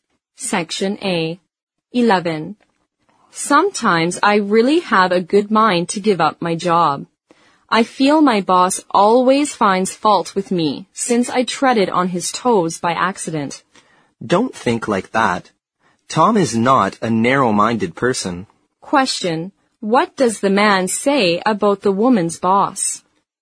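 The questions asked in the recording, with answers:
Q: What does the man say about the woman's boss?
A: He is not a narrow-minded person.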